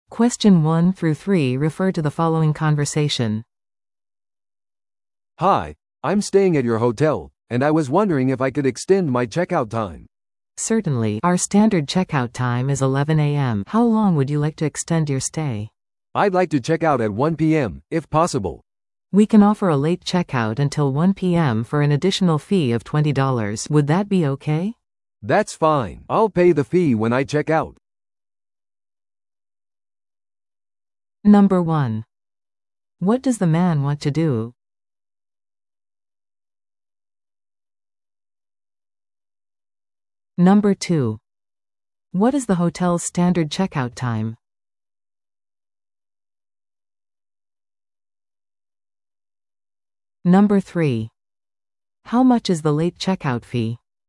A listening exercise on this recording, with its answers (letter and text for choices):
Listen to the audio below and answer the questions.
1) What does the man want to do?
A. モーニングコールを依頼する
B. チェックアウト時間を延長する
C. もう一泊予約する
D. 部屋を変更する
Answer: B. チェックアウト時間を延長する

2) What is the hotel's standard checkout time?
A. 午前10時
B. 午前11時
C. 正午12時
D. 午後1時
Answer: B. 午前11時

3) How much is the late checkout fee?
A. 10ドル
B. 15ドル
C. 20ドル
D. 25ドル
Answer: C. 20ドル

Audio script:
A: "Hi, I'm staying at your hotel, and I was wondering if I could extend my checkout time."
B: "Certainly. Our standard checkout time is 11 AM. How long would you like to extend your stay?"
A: "I'd like to check out at 1 PM, if possible."
B: "We can offer a late checkout until 1 PM for an additional fee of $20. Would that be okay?"
A: "That's fine. I'll pay the fee when I check out."